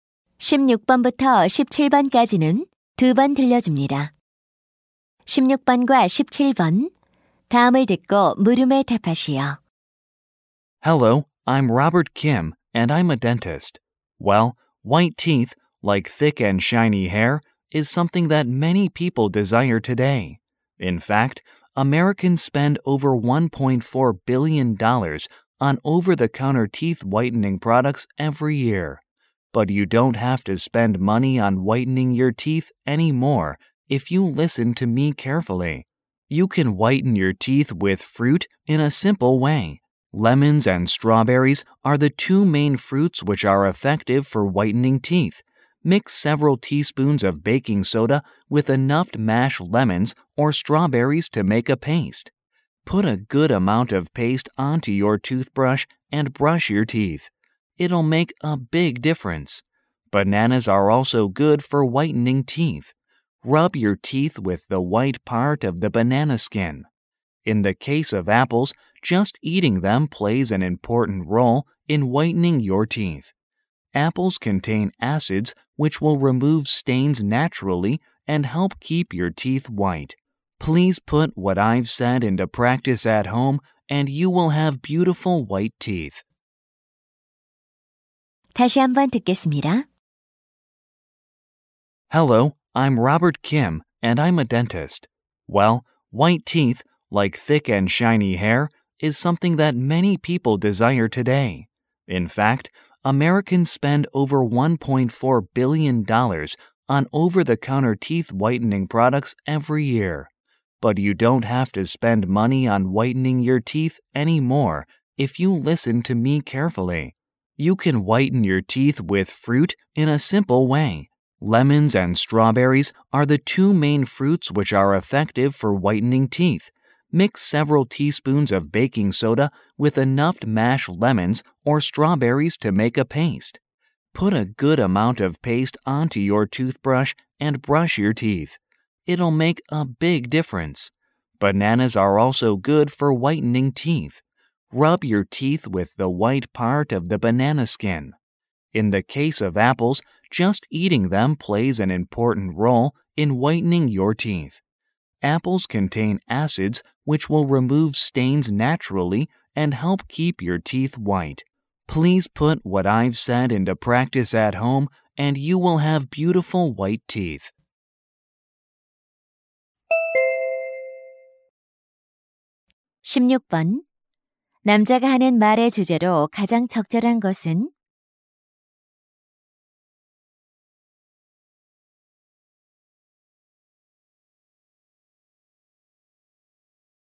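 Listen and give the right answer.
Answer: 과일로 치아를 하얗게 하는 방법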